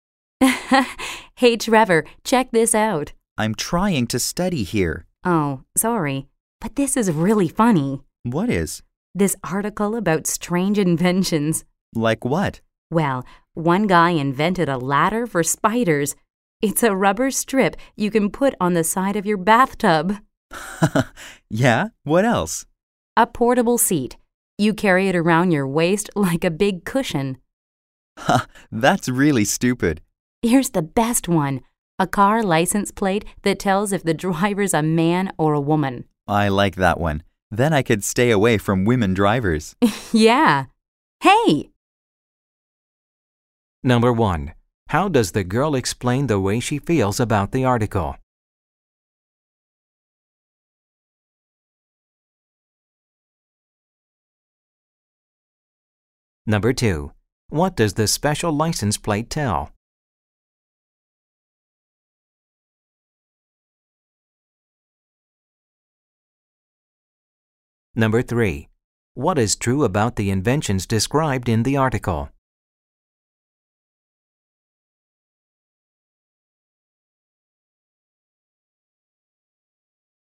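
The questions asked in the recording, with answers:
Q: How does the girl explain the way she feels about the article?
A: She thinks it is really funny.

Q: What does the special license plate tell?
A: Whether the driver is a man or a woman.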